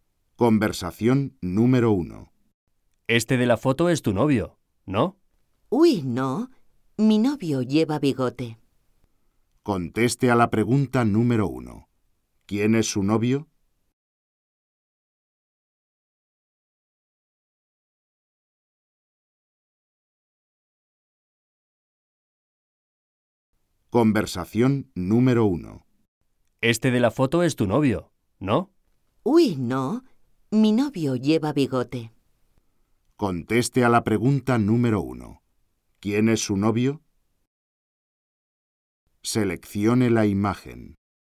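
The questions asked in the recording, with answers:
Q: ¿Quién es su novio?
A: El que lleva bigote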